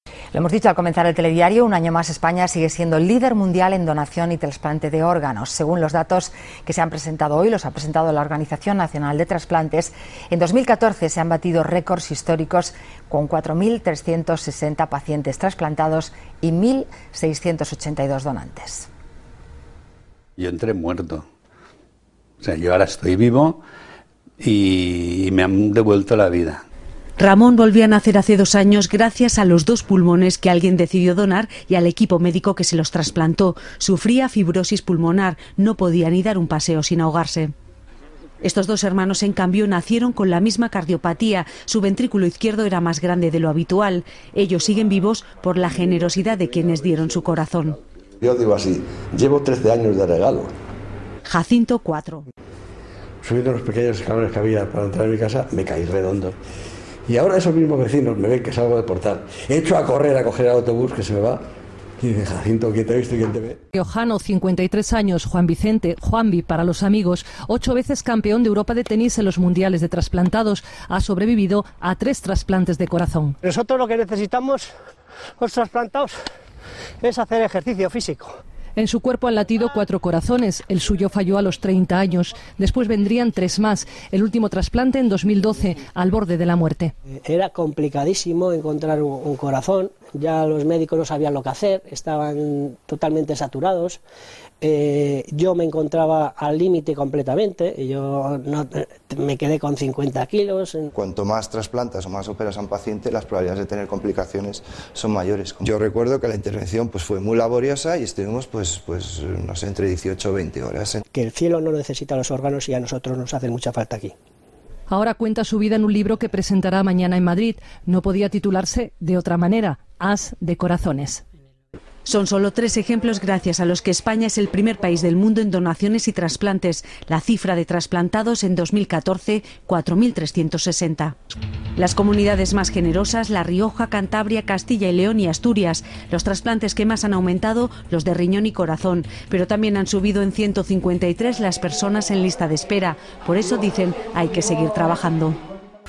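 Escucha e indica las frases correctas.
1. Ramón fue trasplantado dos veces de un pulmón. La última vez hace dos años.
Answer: Falsa

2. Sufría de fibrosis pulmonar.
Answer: Correcta

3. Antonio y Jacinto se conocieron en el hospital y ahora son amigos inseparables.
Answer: Falsa

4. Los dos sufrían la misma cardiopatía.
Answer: Correcta

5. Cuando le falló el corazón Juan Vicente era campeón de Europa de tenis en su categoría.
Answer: Falsa

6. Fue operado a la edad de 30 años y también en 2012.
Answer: Correcta

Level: 中高级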